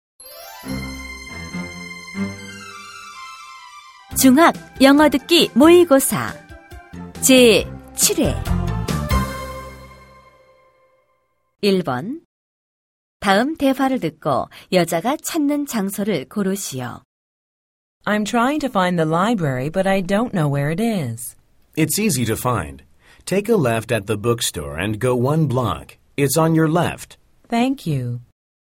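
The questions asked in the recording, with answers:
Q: 다음 대화를 듣고 여자가 찾는 장소를 고르시오.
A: 도서관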